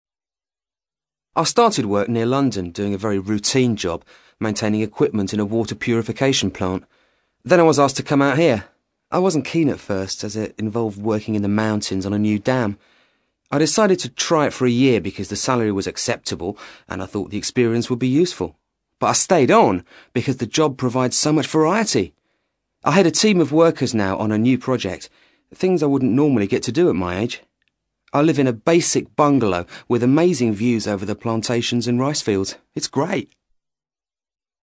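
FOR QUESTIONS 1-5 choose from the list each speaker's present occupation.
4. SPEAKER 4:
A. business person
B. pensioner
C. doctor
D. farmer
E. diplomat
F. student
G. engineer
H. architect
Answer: G. engineer

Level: CAE

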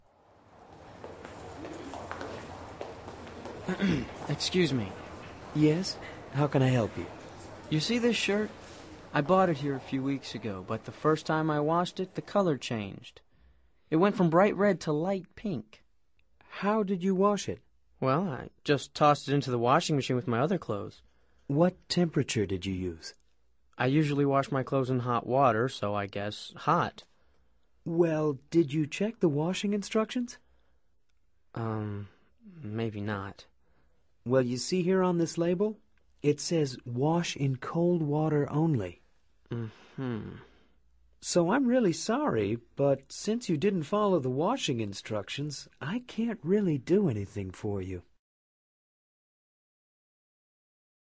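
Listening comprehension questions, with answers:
Activity 72: Basándote en los comentarios anteriores, selecciona las opciones más adecuadas para cada oración. Verifica luego las respuestas correctas.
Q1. What's wrong with Mario's shirt?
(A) It went from pink to red.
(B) It went from red to pink.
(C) It was washed in cold water.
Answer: (B) It went from red to pink.

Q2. Actually, Mario did not ...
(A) follow the washing instructions.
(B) wash the shirt in hot water.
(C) fix the temperature control.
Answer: (A) follow the washing instructions.

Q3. What would Mario like to do?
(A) To exchange the shirt.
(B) To get a refund.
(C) He doesn't say.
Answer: (C) He doesn't say.

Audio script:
Yes, how can I help you?
You see this shirt? I bought it here a few weeks ago, but the first time I washed it, the color changed: It went from bright red to light pink.
How did you wash it?
Well, I just tossed it into the washing machine with my other clothes.
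What temperature did you use?
I usually wash my clothes in hot water, so I guess hot.
Well, did you check the washing instructions?
Um ... maybe not.
Well, you see here on this label? It says, "Wash in cold water only."
So I'm really sorry, but since you didn't follow the washing instructions, I can't really do anything for you.

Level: Nivel Avanzado

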